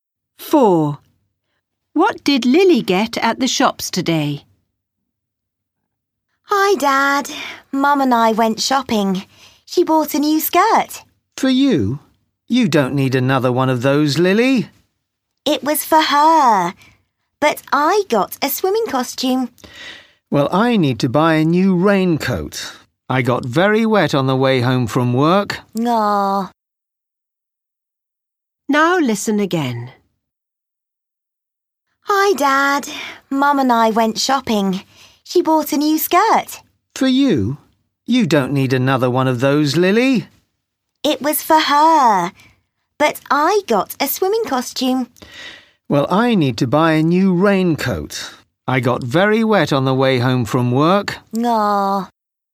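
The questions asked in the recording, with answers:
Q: What did Lily get at the shops today?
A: A swimming costume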